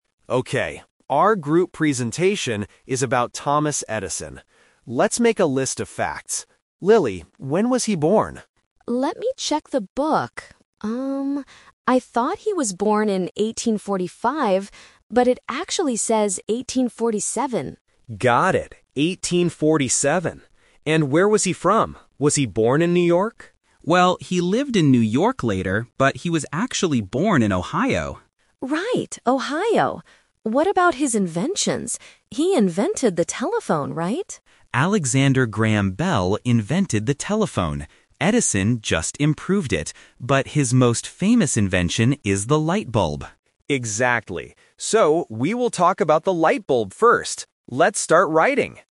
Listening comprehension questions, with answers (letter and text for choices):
Listen to three students (Max, Lily, and Sam) discussing their presentation on Thomas Edison. For each question, choose the correct answer (A, B, or C).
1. When was Thomas Edison born?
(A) In 1845.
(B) In 1847.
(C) In 1850.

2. Where was Thomas Edison born?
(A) In New York.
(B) In Ohio.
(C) In London.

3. Which invention will the group talk about first?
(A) The telephone.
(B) The light bulb.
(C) The airplane.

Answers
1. (B) In 1847.
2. (B) In Ohio.
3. (B) The light bulb.

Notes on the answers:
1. Lily corrects her own mistake: "I thought he was born in 1845, but it actually says 1847." Why the traps are wrong: Option A is the "Twist Trap" – it was Lily's first guess before she checked the book. Option C is not mentioned in the audio.
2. Sam corrects Max's guess: "...but he was actually born in Ohio." Why the traps are wrong: Option A is a trap. Max asks if he was born in New York, and Sam says he lived there later, but wasn't born there. Option C is not mentioned.
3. Sam says Edison's most famous invention is the light bulb, and Max agrees: "So, we will talk about the light bulb first." Why the traps are wrong: Option A is a "Speaker Confusion/Twist" trap. Lily asks if he invented the telephone, but Sam explains that someone else invented it (Alexander Graham Bell). Option C is not mentioned.

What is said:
Max: Okay, our group presentation is about Thomas Edison. Let's make a list of facts. Lily, when was he born?
Lily: Let me check the book. I thought he was born in 1845, but it actually says 1847.
Max: Got it. 1847. And where was he from? Was he born in New York?
Sam: Well, he lived in New York later, but he was actually born in Ohio.
Lily: Right, Ohio. What about his inventions? He invented the telephone, right?
Sam: Alexander Graham Bell invented the telephone. Edison just improved it. But his most famous invention is the light bulb.
Max: Exactly. So, we will talk about the light bulb first. Let's start writing!